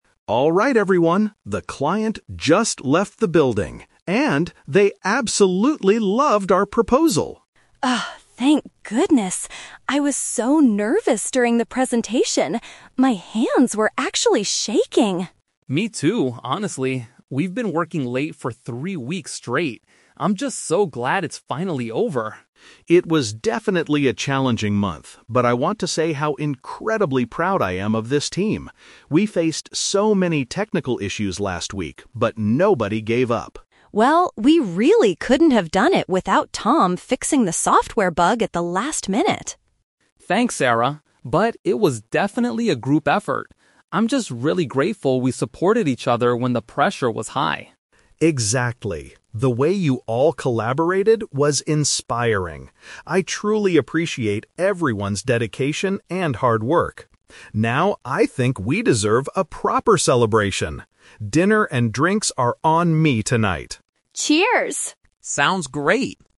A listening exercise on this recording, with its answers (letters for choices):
Listen to the conversation between a team leader and his team members. Choose the correct answer (A, B, or C) for each question.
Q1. What is the main reason the team is having this conversation?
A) To discuss how to fix a recent software bug.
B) To celebrate a successful presentation given to a customer.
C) To plan the schedule for their next marketing project.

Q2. How does David feel about his team?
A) He is highly satisfied because they didn't quit during hard times.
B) He is nervous because the team has been working late for weeks.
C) He is surprised that everyone managed to finish the project on time.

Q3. According to Tom, what was the key to their success?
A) His personal ability to solve the technical problem by himself.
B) The fact that the team members assisted one another.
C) The client's willingness to give them extra time to work.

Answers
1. B
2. A
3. B

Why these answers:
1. The Key: David announces that "the client just left" and they "loved our proposal." This is a paraphrase of having a successful presentation with a customer. The Trap (A): The audio mentions "fixing the software bug," but this is an event that happened in the past (last minute before the presentation), not the main reason they are talking right now. The Plausible (C): Planning a schedule is a normal team activity, but it is never mentioned in this conversation.
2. The Key: David says he is "incredibly proud" and notes that they faced issues "but nobody gave up." This perfectly matches being "highly satisfied" because they "didn't quit." The Trap (B): The words "nervous" and "working late" are in the audio, but Sarah was nervous and Tom mentioned working late. David is the one who feels proud. The Plausible (C): It is logical to be surprised when finishing a hard project, but David does not express surprise; he expresses pride and appreciation.
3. The Key: Tom says, "it was definitely a group effort" and he is grateful they "supported each other." "Assisted one another" is a direct synonym for supporting each other. The Trap (A): Sarah praises Tom for fixing the bug by himself, but Tom rejects this compliment (The Trap) by saying "But it was definitely a group effort." He doesn't take all the credit. The Trap (C): The client is mentioned at the beginning, but there is no information about the client giving them extra time.

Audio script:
David: Alright everyone, the client just left the building. And... they absolutely loved our proposal!
Sarah: Oh, thank goodness! I was so nervous during the presentation. My hands were actually shaking.
Tom: Me too, honestly. We've been working late for three weeks straight. I'm just so glad it's finally over.
David: It was definitely a challenging month, but I want to say how incredibly proud I am of this team. We faced so many technical issues last week, but nobody gave up.
Sarah: Well, we really couldn't have done it without Tom fixing the software bug at the last minute.
Tom: Thanks, Sarah. But it was definitely a group effort. I'm just really grateful we supported each other when the pressure was high.
David: Exactly. The way you all collaborated was inspiring. I truly appreciate everyone's dedication and hard work. Now, I think we deserve a proper celebration. Dinner and drinks are on me tonight!
Sarah & Tom: Cheers! / Sounds great!